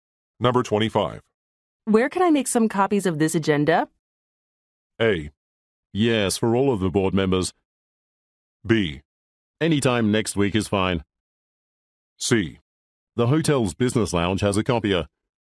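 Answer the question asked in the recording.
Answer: C: The hotel's business lounge has a copier.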